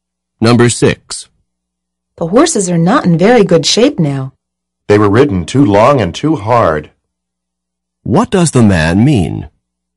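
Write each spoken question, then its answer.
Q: What does the man mean?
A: The horses were ridden too long and too hard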